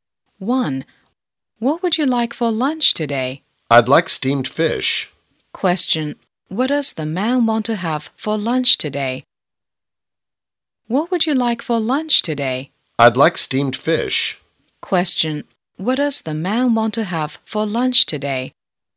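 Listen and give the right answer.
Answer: Steamed fish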